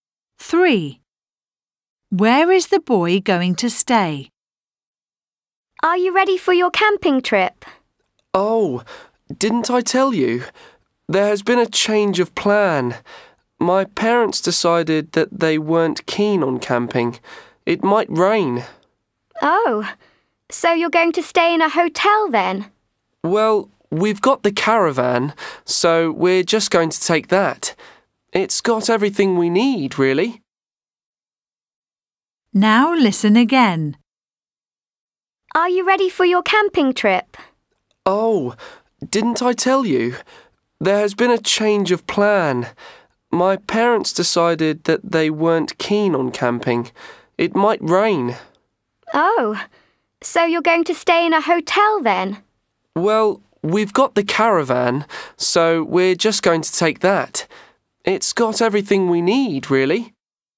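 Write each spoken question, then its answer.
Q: Where is the boy going to stay?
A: In a caravan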